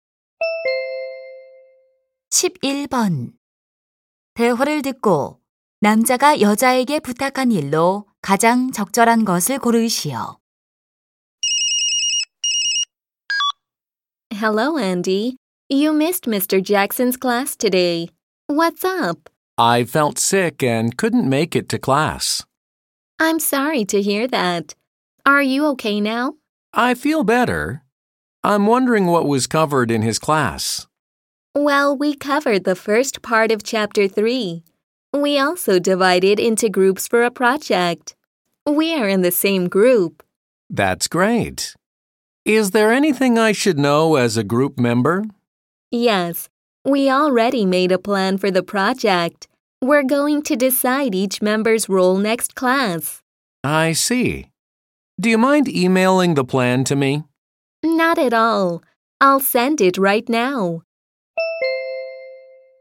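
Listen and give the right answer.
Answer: 프로젝트 계획을 이메일로 보내 주기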